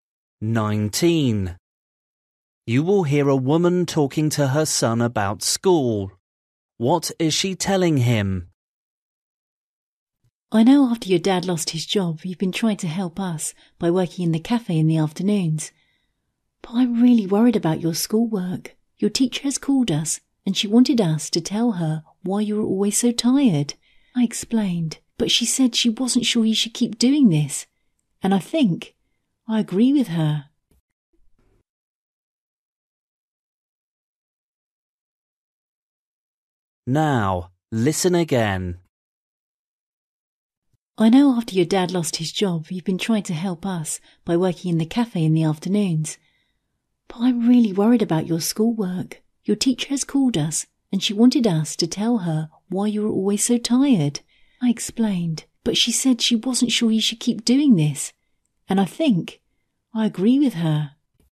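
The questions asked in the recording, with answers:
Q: What is she telling him?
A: He should stop working at the cafe because it is hurting his schoolwork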